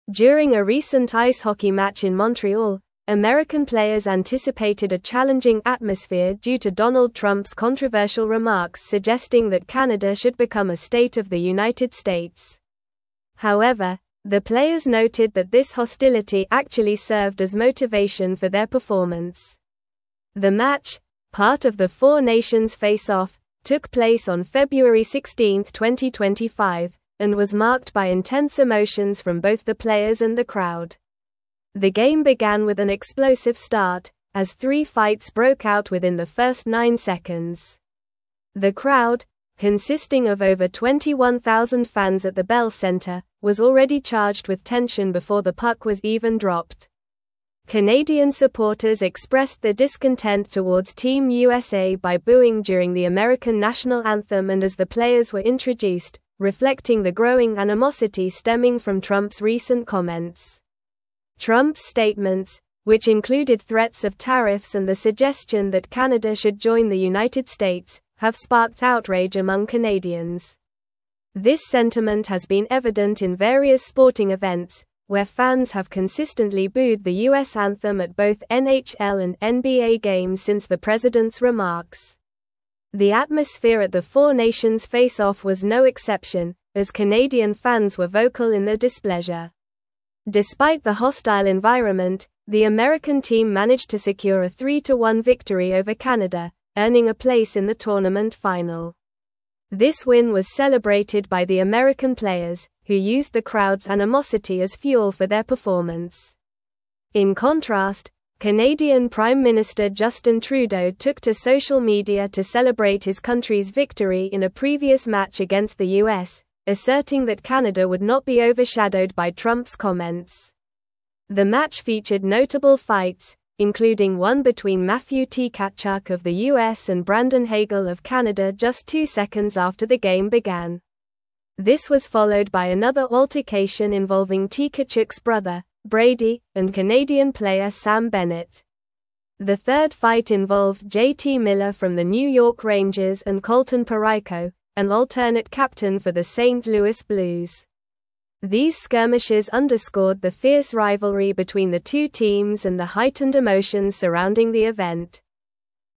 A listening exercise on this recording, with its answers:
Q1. During a (1)______ ice hockey match in Montreal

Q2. However, the players noted that this hostility actually served as motivation for their (2)______.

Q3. and was (3)______ by (4)______ emotions from both the players and the crowd.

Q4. and was (3)______ by (4)______ emotions from both the players and the crowd.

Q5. was already charged with (5)______ before the puck was even dropped.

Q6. reflecting the growing animosity (6)______ from Trump's recent comments.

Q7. This sentiment has been (7)______ in (8)______ sporting events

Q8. This sentiment has been (7)______ in (8)______ sporting events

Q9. since the president's (9)______.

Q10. as (10)______ fans were vocal in their displeasure.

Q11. who used the crowd's (11)______ as fuel for their performance.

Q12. Canadian Prime Minister Justin (12)______ took to social media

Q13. just two seconds after the game (13)______.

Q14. The (14)______ fight (15)______ J.T. Miller from the New York Rangers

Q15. The (14)______ fight (15)______ J.T. Miller from the New York Rangers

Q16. an alternate (16)______ for the St. Louis Blues.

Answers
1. recent
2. performance
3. marked
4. intense
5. tension
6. stemming
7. evident
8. various
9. remarks
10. Canadian
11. animosity
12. Trudeau
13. began
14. third
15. involved
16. captain

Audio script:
During a recent ice hockey match in Montreal, American players anticipated a challenging atmosphere due to Donald Trump's controversial remarks suggesting that Canada should become a state of the United States. However, the players noted that this hostility actually served as motivation for their performance. The match, part of the 4 Nations Face-Off, took place on February 16, 2025, and was marked by intense emotions from both the players and the crowd.
The game began with an explosive start, as three fights broke out within the first nine seconds. The crowd, consisting of over 21,000 fans at the Bell Centre, was already charged with tension before the puck was even dropped. Canadian supporters expressed their discontent towards Team USA by booing during the American national anthem and as the players were introduced, reflecting the growing animosity stemming from Trump's recent comments.
Trump's statements, which included threats of tariffs and the suggestion that Canada should join the United States, have sparked outrage among Canadians. This sentiment has been evident in various sporting events, where fans have consistently booed the US anthem at both NHL and NBA games since the president's remarks. The atmosphere at the 4 Nations Face-Off was no exception, as Canadian fans were vocal in their displeasure.
Despite the hostile environment, the American team managed to secure a 3-1 victory over Canada, earning a place in the tournament final. This win was celebrated by the American players, who used the crowd's animosity as fuel for their performance. In contrast, Canadian Prime Minister Justin Trudeau took to social media to celebrate his country's victory in a previous match against the US, asserting that Canada would not be overshadowed by Trump's comments.
The match featured notable fights, including one between Matthew Tkachuk of the US and Brandon Hagel of Canada just two seconds after the game began. This was followed by another altercation involving Tkachuk's brother, Brady, and Canadian player Sam Bennett. The third fight involved J.T. Miller from the New York Rangers and Colton Parayko, an alternate captain for the St. Louis Blues. These skirmishes underscored the fierce rivalry between the two teams and the heightened emotions surrounding the event.

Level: Level 4